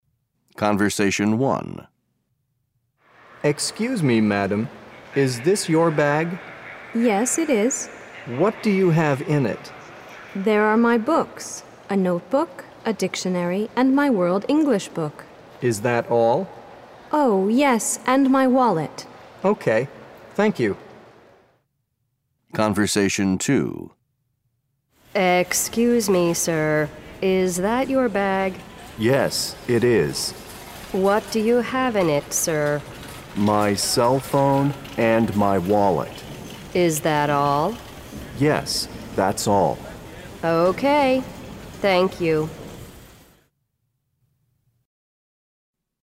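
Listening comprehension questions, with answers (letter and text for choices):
Listen to the conversations. Then choose the owner of each object.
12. a World English book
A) The man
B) The woman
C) The man and the woman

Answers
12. B) The woman

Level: Eleventh Grade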